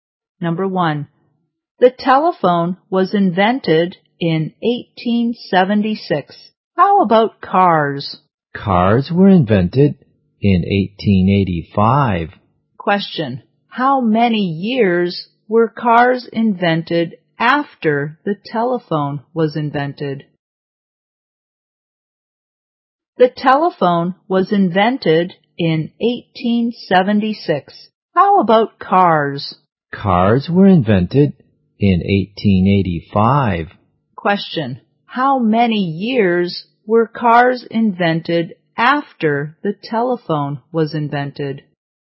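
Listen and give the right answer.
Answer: 9 years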